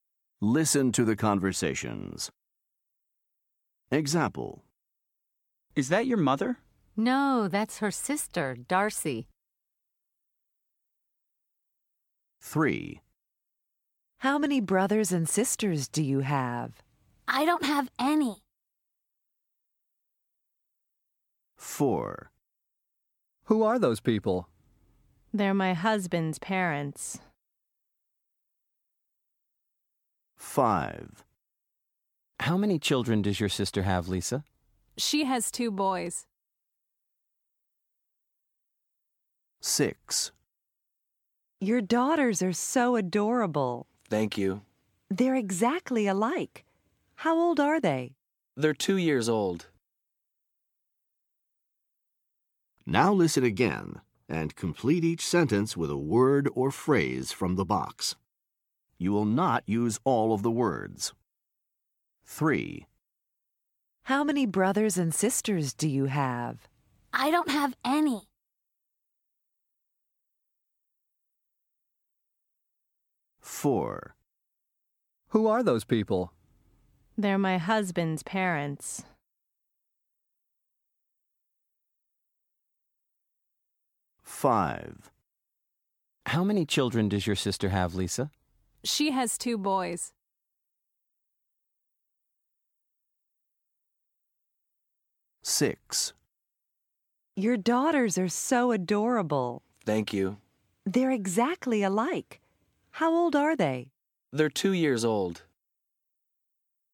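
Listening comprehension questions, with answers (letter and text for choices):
Listen to the conversations. Then listen again and drag and drop the correct word or phrase from the box to the blank fields to complete each sentence.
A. an only child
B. in-laws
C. nephews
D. twins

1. The boy is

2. They are her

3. The boys are Lisa's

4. The girls are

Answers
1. A. an only child
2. B. in-laws
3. C. nephews
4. D. twins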